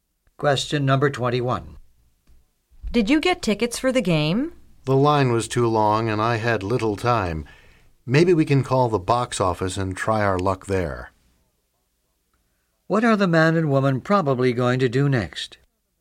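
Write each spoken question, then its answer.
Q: What are the man and woman probably going to do next?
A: Call the box office to try to get tickets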